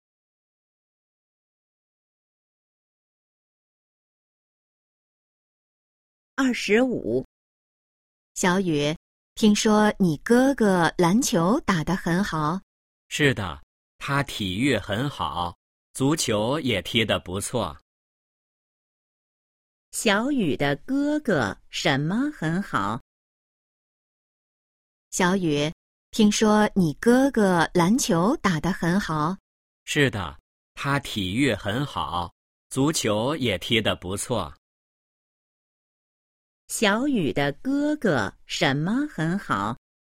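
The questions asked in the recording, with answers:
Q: 小雨的哥哥什么很好?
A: 体育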